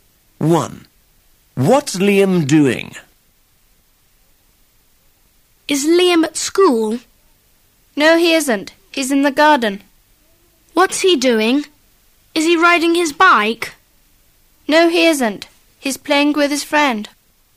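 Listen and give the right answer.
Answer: Playing with his friend in the garden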